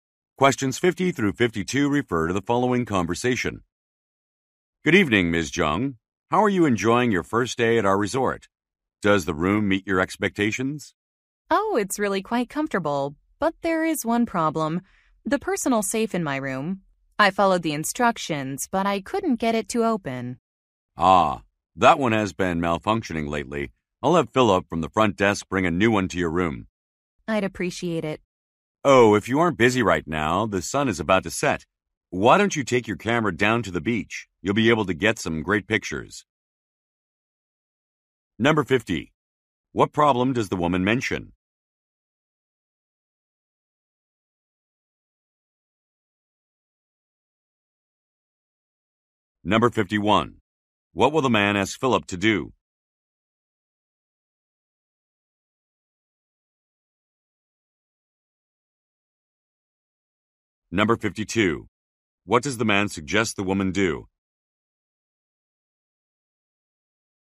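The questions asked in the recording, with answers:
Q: What problem does the woman mention?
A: The safe in her room won't open

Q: What will the man ask Philip to do?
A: Bring a new safe to her room

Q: What does the man suggest the woman do?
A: Take pictures of the sunset at the beach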